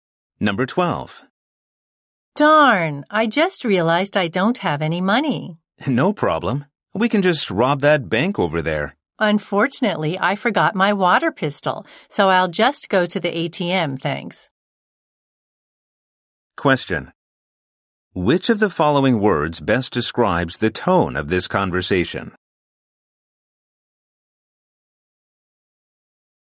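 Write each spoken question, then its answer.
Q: Which of the following words best describes the tone of this conversation?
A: Joking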